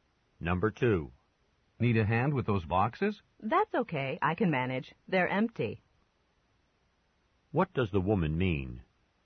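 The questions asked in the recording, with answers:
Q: What does the woman mean?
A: She doesn't need help; the boxes are empty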